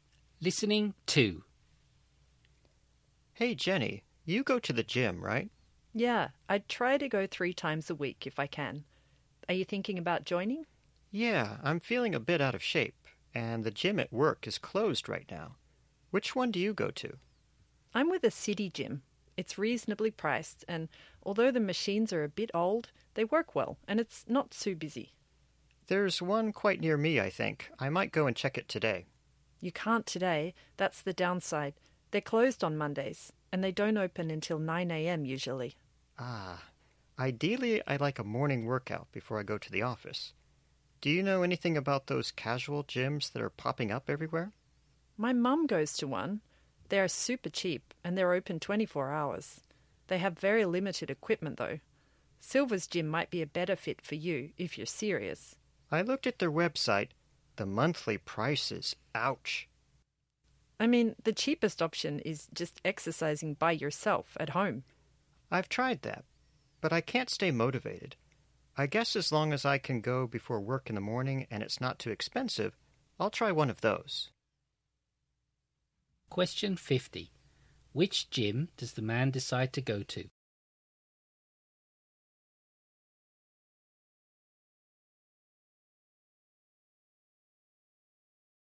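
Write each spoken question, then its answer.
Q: Which gym does the man decide to go to?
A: A cheap casual gym that is open 24 hours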